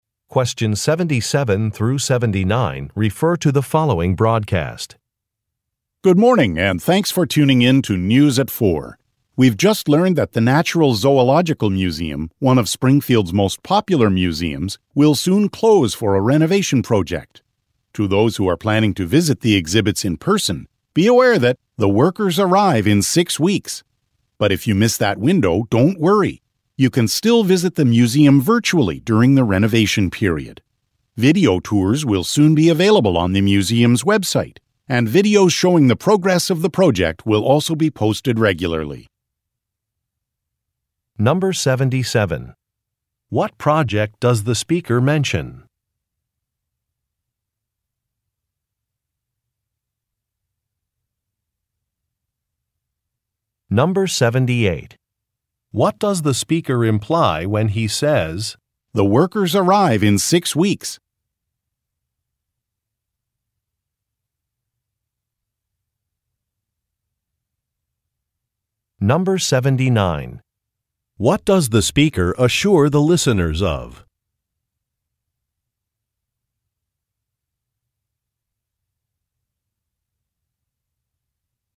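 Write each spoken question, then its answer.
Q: What project does the speaker mention?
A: A renovation of the Natural Zoological Museum

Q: What does the speaker assure the listeners of?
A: They can still visit the museum virtually during the renovation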